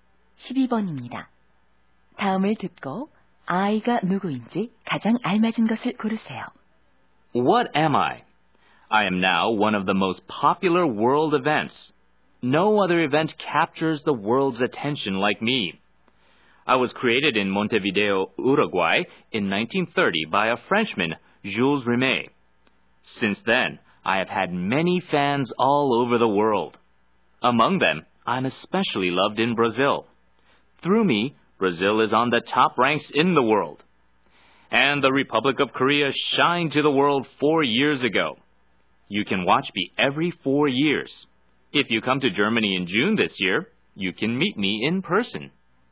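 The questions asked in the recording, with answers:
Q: 다음을 듣고 아이가 누구인지 가장 알맞은 것을 고르세요.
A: 월드컵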